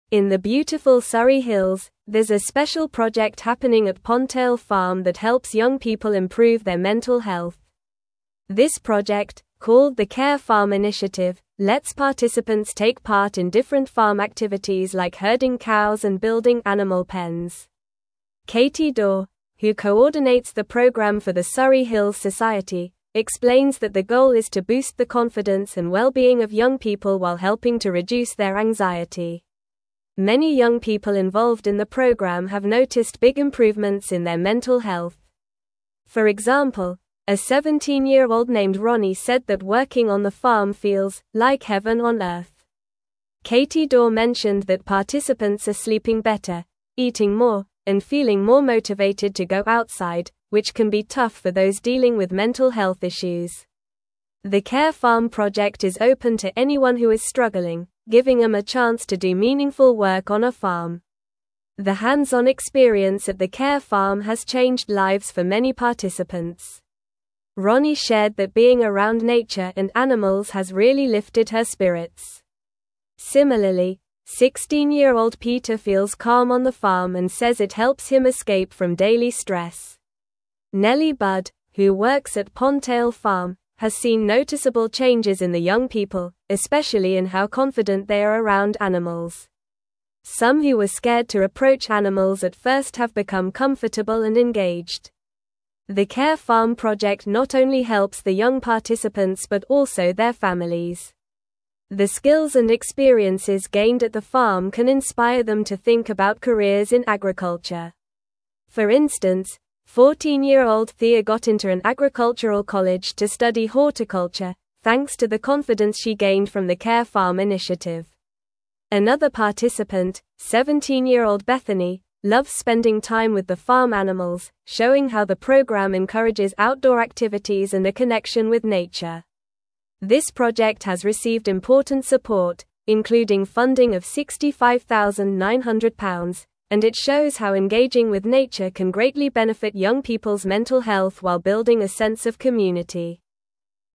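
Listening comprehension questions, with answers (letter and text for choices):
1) What is the main purpose of the Care Farm initiative?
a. To teach farming techniques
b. To provide free food to families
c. To create a tourist attraction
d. To improve the mental health of young people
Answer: d. To improve the mental health of young people

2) Who coordinates the Care Farm program for the Surrey Hills Society?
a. Katie Daw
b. Ronnie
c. Nellie Budd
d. Peter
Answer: a. Katie Daw

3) What type of activities do participants engage in at the Care Farm?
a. Cooking and cleaning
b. Gardening and painting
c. Herding cows and building animal pens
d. Studying and writing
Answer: c. Herding cows and building animal pens

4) How has working on the farm affected Ronnie's mental health?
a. She prefers to stay indoors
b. She feels it's "like heaven on earth"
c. She has become more anxious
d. She dislikes being around animals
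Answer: b. She feels it's "like heaven on earth"

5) What positive changes have participants noticed since joining the Care Farm?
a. Less interest in outdoor activities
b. More time spent on social media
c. Better sleep and increased motivation to go outside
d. Decreased appetite for healthy food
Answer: c. Better sleep and increased motivation to go outside

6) What impact has the Care Farm project had on participants' families?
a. It inspires them to consider careers in agriculture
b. It causes them to worry more about their children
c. It has no effect on families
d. It makes them spend less time together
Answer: a. It inspires them to consider careers in agriculture

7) What did Thea achieve as a result of her experience at the Care Farm?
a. She decided to leave school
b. She started a business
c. She moved to a different country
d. She got into an agricultural college to study horticulture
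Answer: d. She got into an agricultural college to study horticulture

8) How much funding has the Care Farm project received?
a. £50,000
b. £65,900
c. £75,000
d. £100,000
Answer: b. £65,900

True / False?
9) The program is exclusively for those not struggling with mental health issues.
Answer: False

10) Katie Daw organizes the Care Farm program for the Surrey Hills Society.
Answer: True

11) The skills learned at the Care Farm can discourage young people from considering careers in agriculture.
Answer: False

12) Participants in the program have reported feeling more confident and less anxious.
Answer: True

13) Many young people involved in the project have experienced better sleep and increased motivation to spend time outdoors.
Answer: True

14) The project has received funding of £65,900 to support its activities and goals.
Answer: True

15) Participants like Ronnie and Peter have found that being around nature and animals helps them feel more anxious and sadder.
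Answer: False

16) The Care Farm initiative at Pondtail Farm helps young people improve their mental health through farm activities.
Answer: True

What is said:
In the beautiful Surrey Hills, there's a special project happening at Pondtail Farm that helps young people improve their mental health. This project, called the Care Farm initiative, lets participants take part in different farm activities like herding cows and building animal pens. Katie Daw, who coordinates the program for the Surrey Hills Society, explains that the goal is to boost the confidence and well-being of young people while helping to reduce their anxiety.
Many young people involved in the program have noticed big improvements in their mental health. For example, a 17-year-old named Ronnie said that working on the farm feels "like heaven on earth." Katie Daw mentioned that participants are sleeping better, eating more, and feeling more motivated to go outside, which can be tough for those dealing with mental health issues. 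The Care Farm project is open to anyone who is struggling, giving them a chance to do meaningful work on a farm.
The hands-on experience at the Care Farm has changed lives for many participants. Ronnie shared that being around nature and animals has really lifted her spirits. Similarly, 16-year-old Peter feels calm on the farm and says it helps him escape from daily stress. Nellie Budd, who works at Pondtail Farm, has seen noticeable changes in the young people, especially in how confident they are around animals. Some who were scared to approach animals at first have become comfortable and engaged.
The Care Farm project not only helps the young participants but also their families. The skills and experiences gained at the farm can inspire them to think about careers in agriculture. For instance, 14-year-old Thea got into an agricultural college to study horticulture, thanks to the confidence she gained from the Care Farm initiative. 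Another participant, 17-year-old Bethany, loves spending time with the farm animals, showing how the program encourages outdoor activities and a connection with nature. This project has received important support, including funding of £65,900, and it shows how engaging with nature can greatly benefit young people's mental health while building a sense of community.

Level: Level 3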